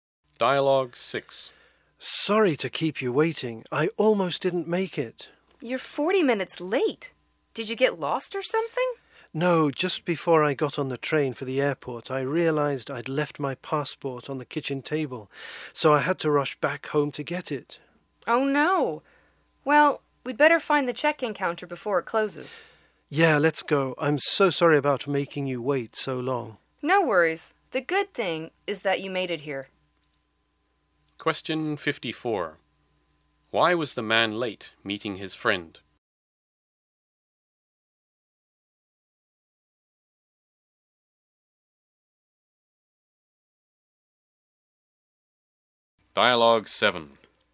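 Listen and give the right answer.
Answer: He had to go back home for his passport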